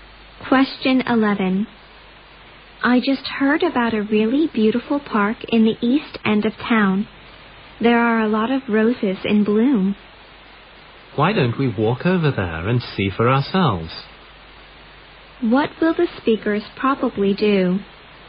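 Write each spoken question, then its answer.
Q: What will the speakers probably do?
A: Walk to the park in the east end of town to see the roses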